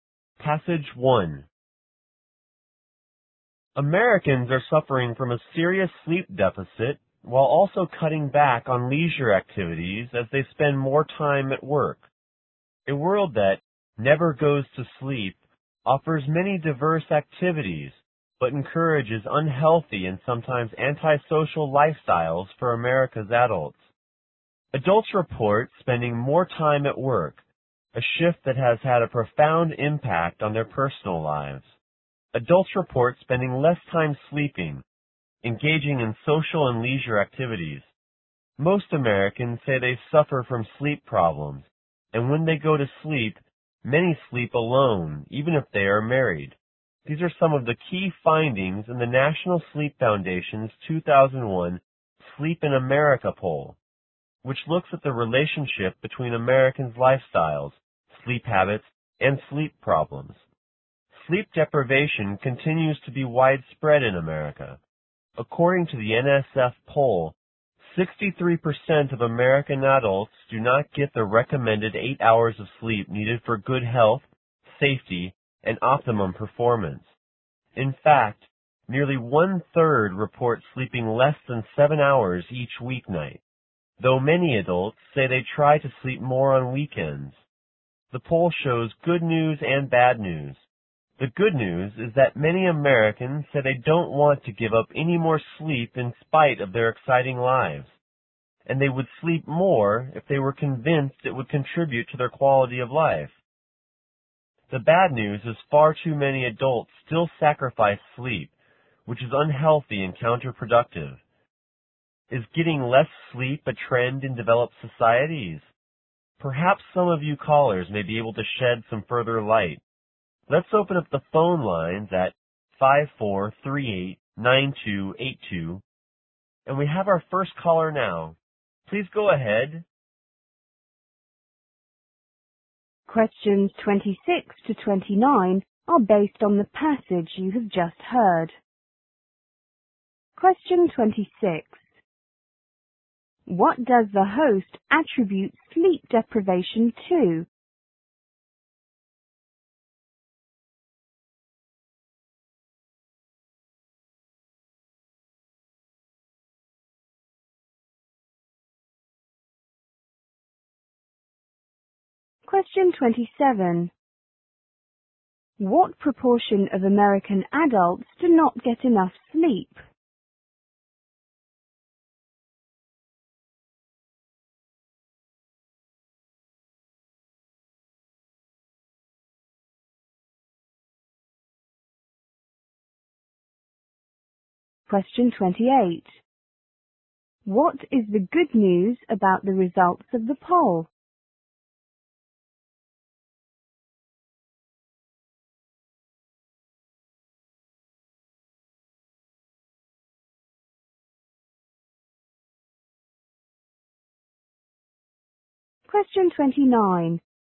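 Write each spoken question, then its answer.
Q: What does the host attribute sleep deprivation to?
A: People spending more time at work.

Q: What proportion of American adults do not get enough sleep?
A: 63%

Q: What is the good news about the results of the poll?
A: Many Americans don't want to give up any more sleep.

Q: How will the host spend the remaining part of the show?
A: Taking calls from listeners.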